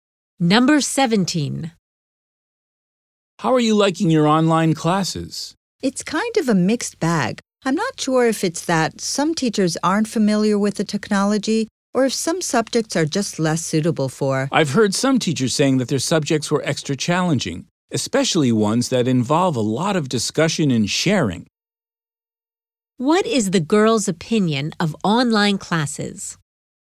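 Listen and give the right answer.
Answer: They are a mixed bag, better for some subjects than others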